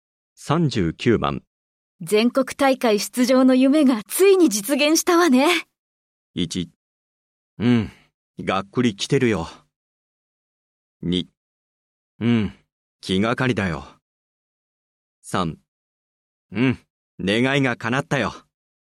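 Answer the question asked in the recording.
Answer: 3: うん、願いが叶ったよ。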